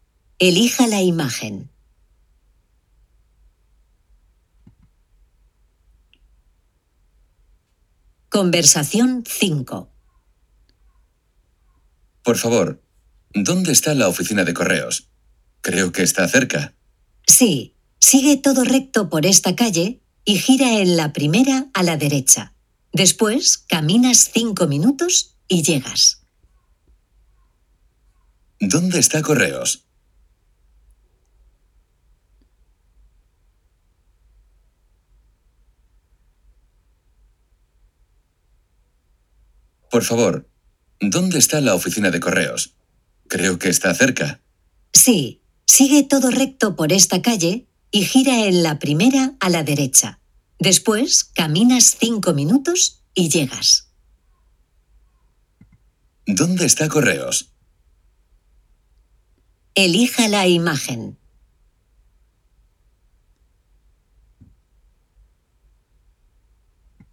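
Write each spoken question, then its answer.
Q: ¿Dónde está correos?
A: Todo recto y la primera calle a la derecha, a 5 minutos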